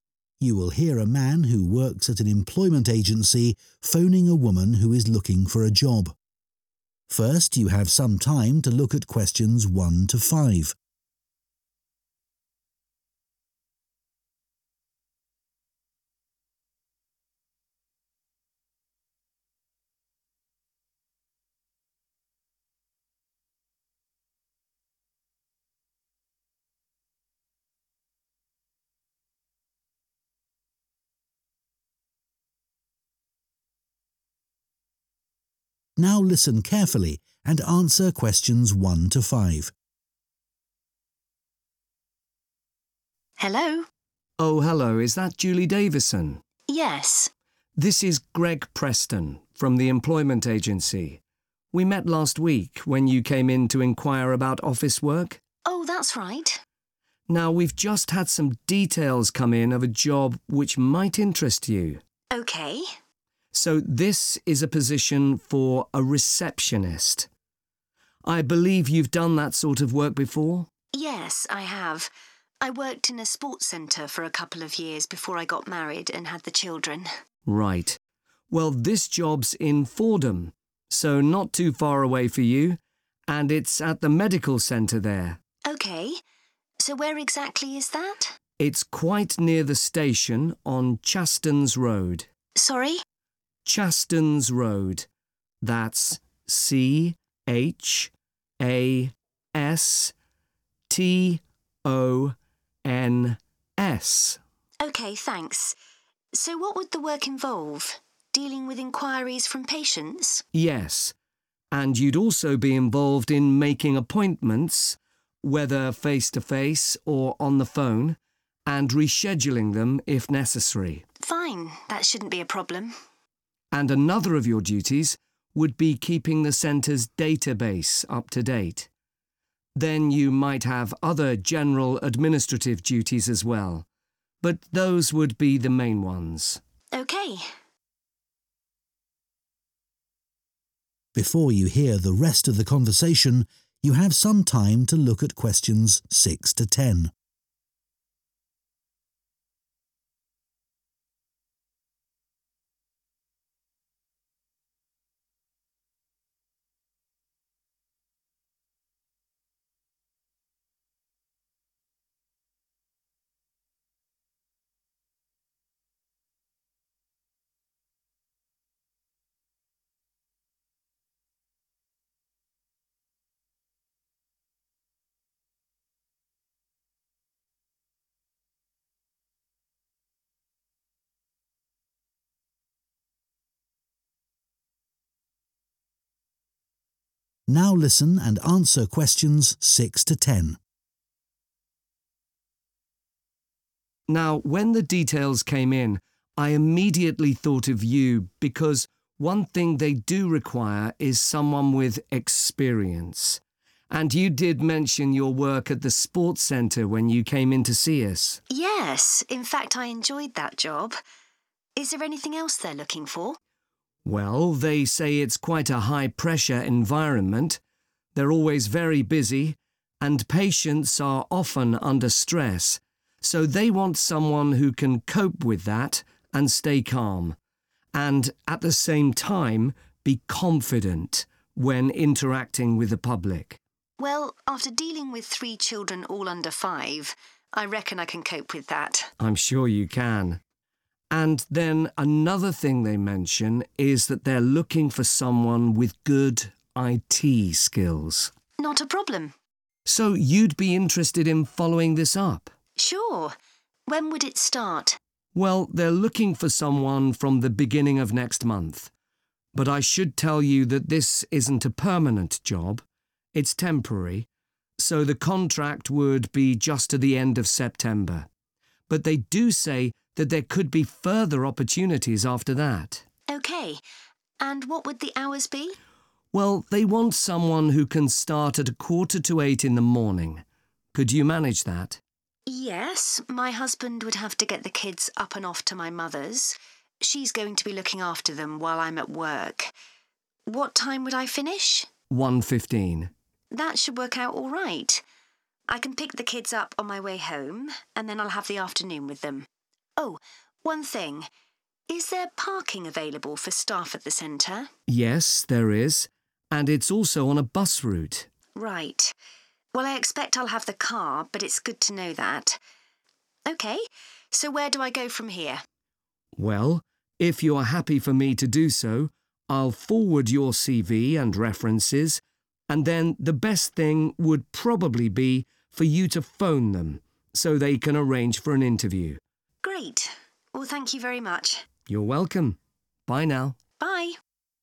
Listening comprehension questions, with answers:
Complete the notes below. Write ONE WORD AND/OR A NUMBER for each answer.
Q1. Role 1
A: receptionist

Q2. Location Fordham 2 Centre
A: Medical

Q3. 3 Road, Fordham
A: Chastons

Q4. making 4 and reorganising them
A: appointments

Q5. maintaining the internal 5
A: database

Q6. 6 (essential)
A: experience

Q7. a calm and 7 manner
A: confident

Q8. a 8 job – further opportunities may be available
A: temporary

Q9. hours: 7.45 a.m. to 9 p.m. Monday to Friday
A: 1.15

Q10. 10 is available onsite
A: parking